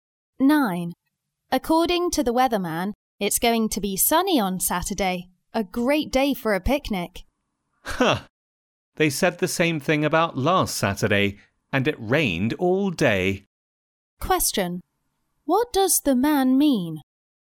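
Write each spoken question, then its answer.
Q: What does the man mean?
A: The weather forecast may be wrong again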